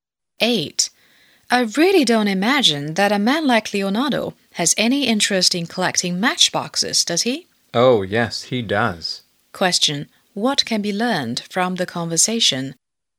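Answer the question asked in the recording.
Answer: Leonardo is interested in collecting matchboxes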